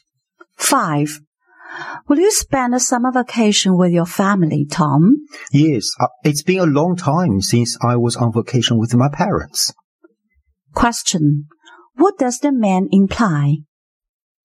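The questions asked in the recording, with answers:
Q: What does the man imply?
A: He hasn't been on vacation with his parents for a long time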